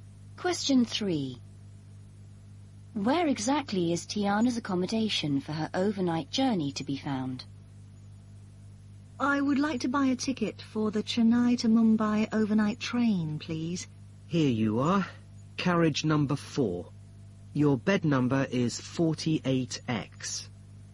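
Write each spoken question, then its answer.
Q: Where exactly is Tiana's accommodation for her overnight journey to be found?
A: Carriage 4, bed 48X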